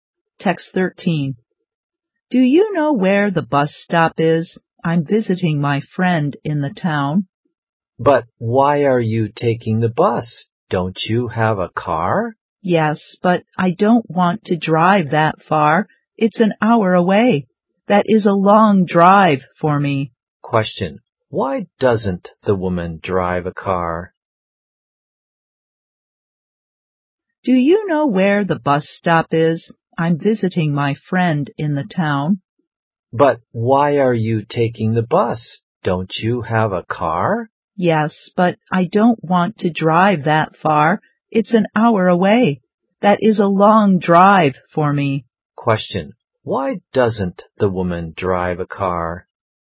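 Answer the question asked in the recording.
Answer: It's too far, an hour away.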